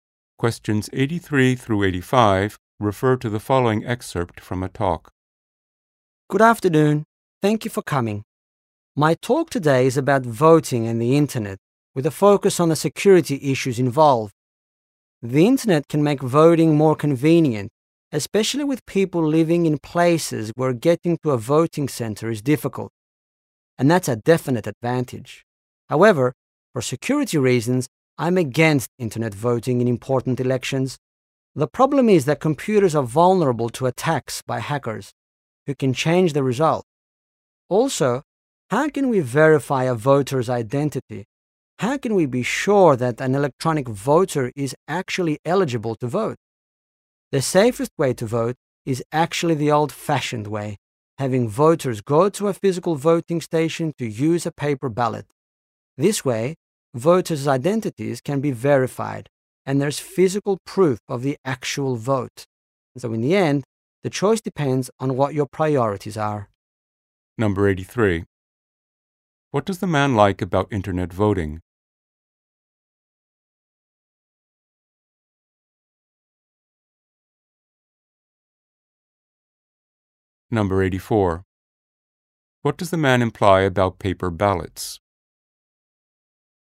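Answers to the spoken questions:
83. It is more convenient
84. They are the safest way to vote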